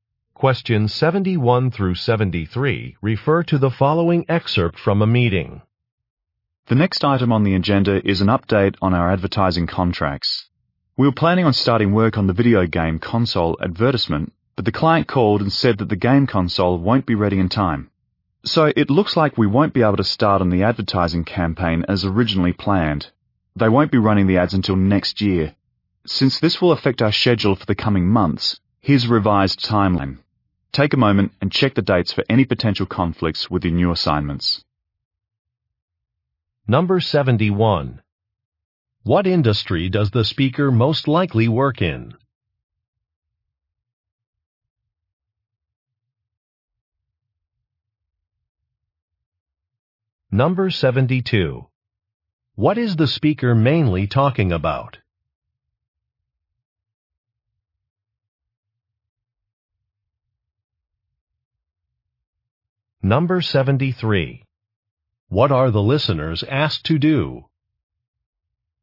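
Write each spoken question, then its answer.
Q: What industry does the speaker most likely work in?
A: Advertising

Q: What is the speaker mainly talking about?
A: A delayed advertising campaign and a revised schedule

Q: What are the listeners asked to do?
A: Check the revised timeline for conflicts with their assignments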